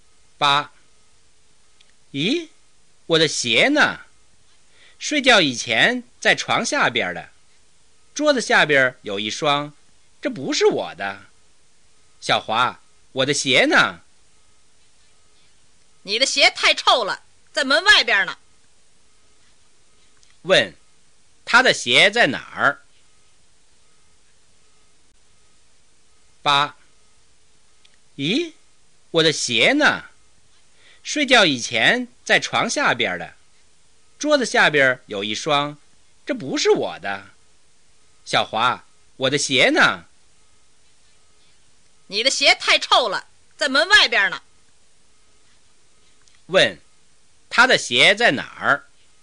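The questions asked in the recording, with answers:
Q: 他的鞋在哪儿?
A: 在门外边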